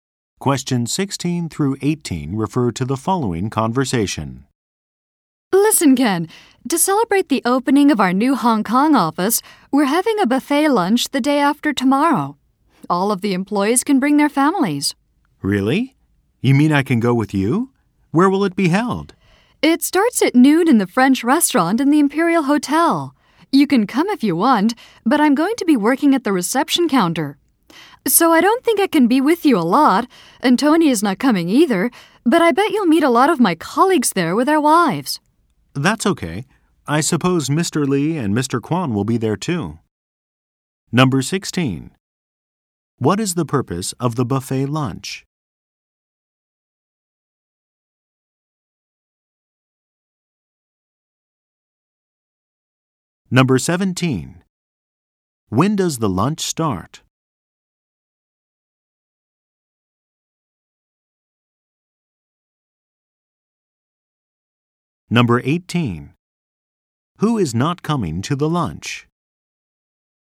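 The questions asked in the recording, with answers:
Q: What is the purpose of the buffet lunch?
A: To celebrate the opening of the new Hong Kong office

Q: When does the lunch start?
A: At noon, the day after tomorrow

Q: Who is not coming to the lunch?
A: Tony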